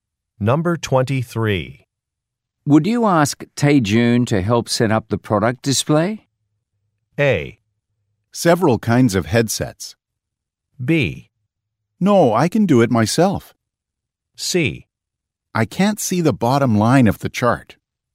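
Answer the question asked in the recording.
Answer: B: No, I can do it myself.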